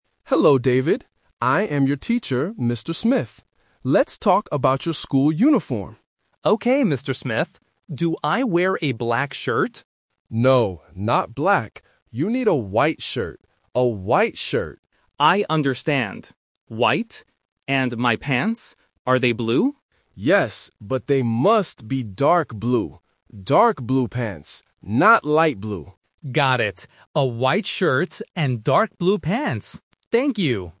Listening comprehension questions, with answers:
Listen to the conversation between a teacher and a student. Choose the correct answer (A, B, or C) for each question.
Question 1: What color shirt does David need?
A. Black.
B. White.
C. Yellow.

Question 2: What color pants must David wear?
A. Dark blue.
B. Light blue.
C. Black.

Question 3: What is the teacher's name?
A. Mr. White.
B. Mr. Black.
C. Mr. Smith.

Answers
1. B. White.
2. A. Dark blue.
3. C. Mr. Smith.

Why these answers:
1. The teacher clearly says, "You need a white shirt," and repeats it. Option A (Black) is the trap because David asks about a black shirt first, but the teacher says "No." Option C is not mentioned.
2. The teacher says the pants "must be dark blue. Dark blue pants." Option B (Light blue) is the trap because the teacher mentions it but explicitly rejects it ("Not light blue"). Option C is not mentioned for pants.
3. At the beginning, the teacher introduces himself: "I am your teacher, Mr. Smith." Options A and B are traps because "White" and "Black" are mentioned in the audio, but they are colors of the clothes, not the teacher's name.

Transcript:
Teacher: Hello, David. I am your teacher, Mr. Smith. Let's talk about your school uniform.
David: Okay, Mr. Smith. Do I wear a black shirt?
Teacher: No, not black. You need a white shirt. A white shirt.
David: I understand. White. And my pants? Are they blue?
Teacher: Yes, but they must be dark blue. Dark blue pants. Not light blue.

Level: A1

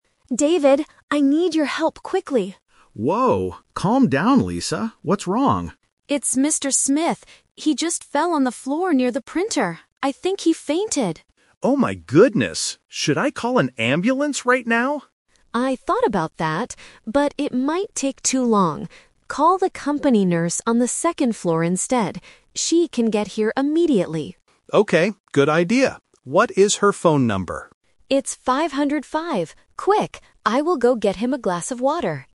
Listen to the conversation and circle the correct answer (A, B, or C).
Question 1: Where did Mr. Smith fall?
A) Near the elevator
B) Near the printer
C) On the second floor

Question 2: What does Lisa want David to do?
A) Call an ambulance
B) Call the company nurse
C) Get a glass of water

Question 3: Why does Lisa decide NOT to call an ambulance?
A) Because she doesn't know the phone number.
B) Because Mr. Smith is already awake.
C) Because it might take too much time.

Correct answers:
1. B) Near the printer
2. B) Call the company nurse
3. C) Because it might take too much time.

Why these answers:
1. Lisa says, "He just fell on the floor near the printer." Option (A) is not mentioned. Option (C) is a trap because the second floor is where the nurse's office is, not where Mr. Smith fell.
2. This is "The Twist". David suggests calling an ambulance (Option A - Trap), but Lisa rejects it. She tells him to call the company nurse instead. Option (C) is a trap because Lisa says she will get the water, not David.
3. Lisa says she didn't choose the ambulance because "it might take too long," which means it takes too much time. Options (A) and (B) are not mentioned in the audio.

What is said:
Lisa: David, I need your help quickly!
David: Whoa, calm down, Lisa. What's wrong?
Lisa: It's Mr. Smith. He just fell on the floor near the printer. I think he fainted!
David: Oh my goodness! Should I call an ambulance right now?
Lisa: I thought about that, but it might take too long. Call the company nurse on the second floor instead. She can get here immediately.
David: Okay, good idea. What is her phone number?

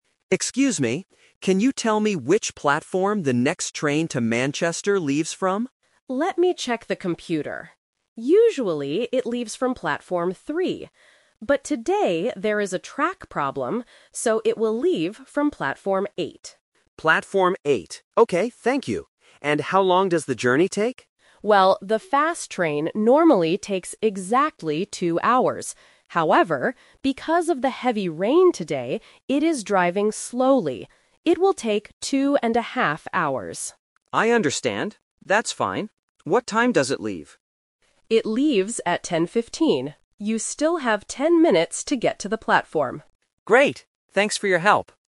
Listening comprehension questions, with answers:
Listen to a conversation between a passenger and a station agent. Choose the correct answer (A, B, or C) for each question.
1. Which platform is the train to Manchester leaving from today?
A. Platform 3.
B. Platform 8.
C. Platform 10.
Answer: B. Platform 8.

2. Why is the journey taking longer than usual today?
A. Because there is a track problem.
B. Because of the heavy rain.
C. Because it is not the fast train.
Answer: B. Because of the heavy rain.

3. How long will the trip to Manchester take today?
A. Exactly two hours.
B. Two and a half hours.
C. Ten minutes.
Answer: B. Two and a half hours.

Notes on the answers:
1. The agent says the train will "leave from platform 8" today. Option (A) is the trap; platform 3 is where it usually leaves from, but not today. Option (C) is a trap using the number 10 from the time (10:15) and minutes left.
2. The agent states that "because of the heavy rain today... it will take two and a half hours." Option (A) is a trap; the "track problem" is the reason the platform changed, not the reason the train is slow. Option (C) is false because the agent explicitly calls it "the fast train."
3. This is the second Twist. The train normally takes two hours, but today "it will take two and a half hours." Option (A) is the trap for the normal duration. Option (C) is a trap; ten minutes is the time the passenger has left to reach the platform.

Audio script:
Passenger: Excuse me. Can you tell me which platform the next train to Manchester leaves from?
Agent: Let me check the computer. Usually, it leaves from platform 3. But today there is a track problem, so it will leave from platform 8.
Passenger: Platform 8. Okay, thank you. And how long does the journey take?
Agent: Well, the fast train normally takes exactly two hours. However, because of the heavy rain today, it is driving slowly. It will take two and a half hours.
Passenger: I understand. That's fine. What time does it leave?
Agent: It leaves at 10:15. You still have ten minutes to get to the platform.

